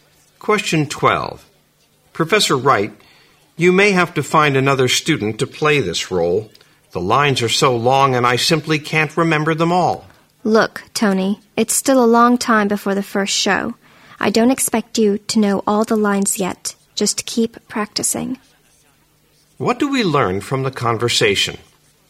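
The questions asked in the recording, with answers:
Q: What do we learn from the conversation?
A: Tony is worried he can't remember his lines for a play; the professor tells him to keep practicing.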